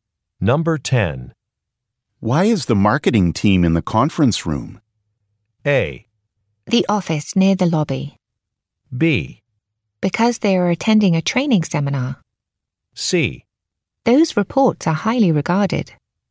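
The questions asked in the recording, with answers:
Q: Why is the marketing team in the conference room?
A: B: Because they are attending a training seminar.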